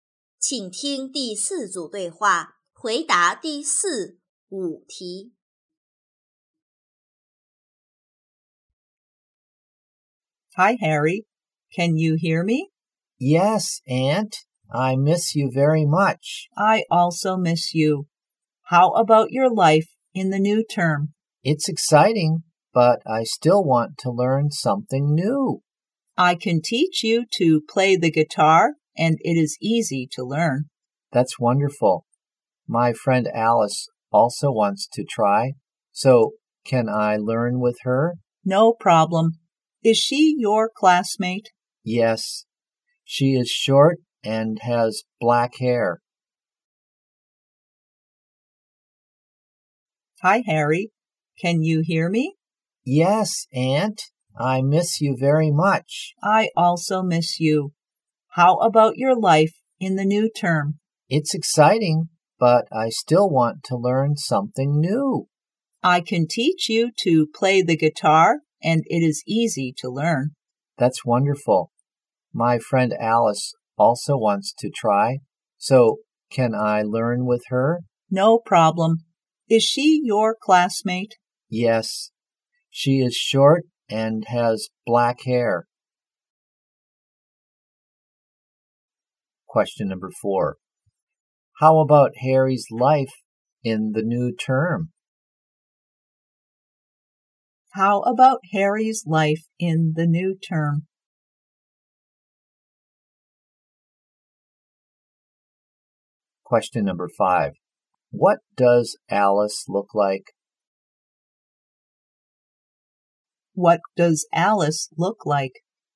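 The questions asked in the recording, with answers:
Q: How about Harry's life in the new term?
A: It's exciting.

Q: What does Alice look like?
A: She is short and has black hair.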